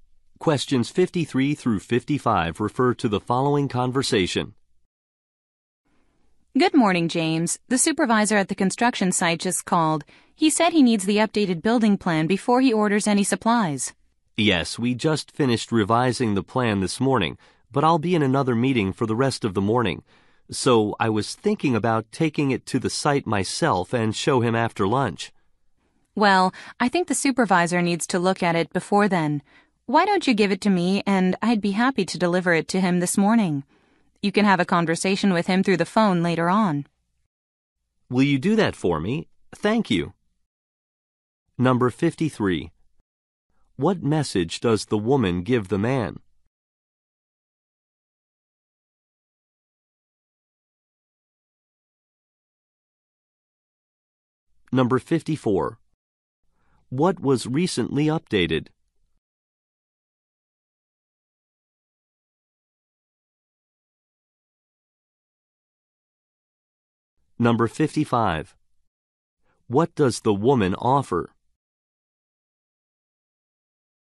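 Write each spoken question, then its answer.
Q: What message does the woman give the man?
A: The supervisor needs the updated building plan

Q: What was recently updated?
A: A building plan

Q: What does the woman offer?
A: To deliver the plan to the supervisor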